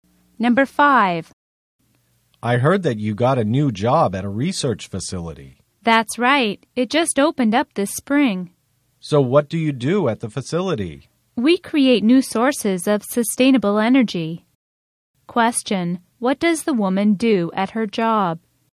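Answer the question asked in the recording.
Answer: She creates new sources of sustainable energy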